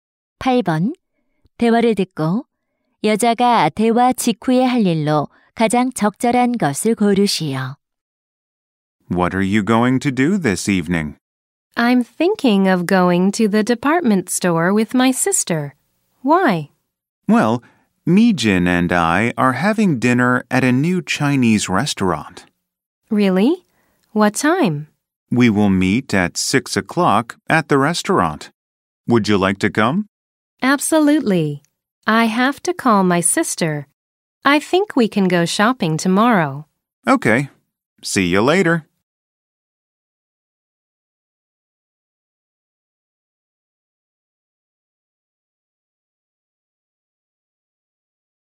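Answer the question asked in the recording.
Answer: 여동생에게 전화하기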